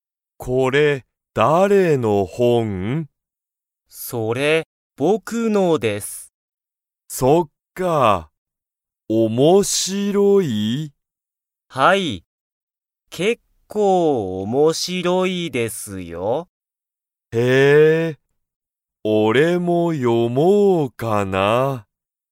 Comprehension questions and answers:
その本ほんは、面白おもしろいですか?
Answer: はい

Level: Level 1